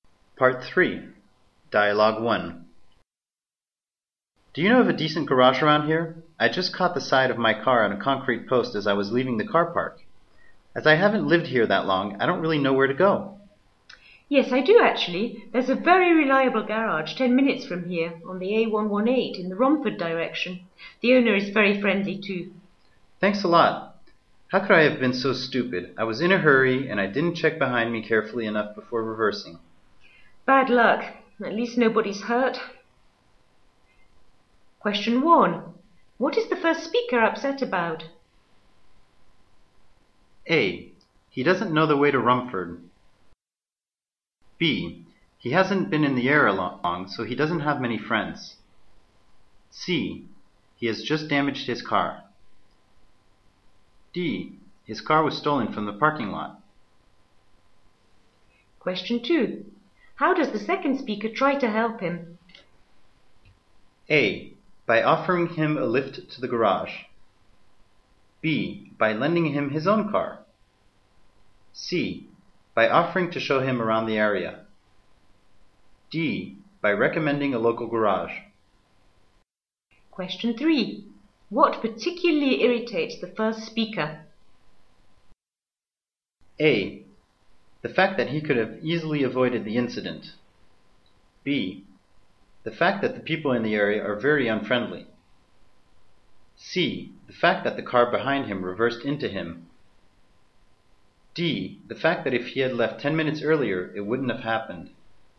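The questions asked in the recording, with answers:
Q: What is the first speaker upset about?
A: C: He has just damaged his car.

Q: How does the second speaker try to help him?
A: D: By recommending a local garage.

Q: What particularly irritates the first speaker?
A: A: The fact that he could have easily avoided the incident.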